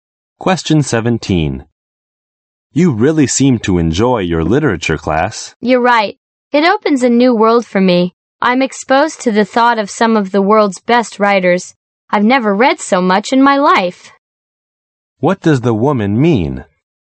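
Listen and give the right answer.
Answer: She enjoys the literature class; it has opened a new world to her.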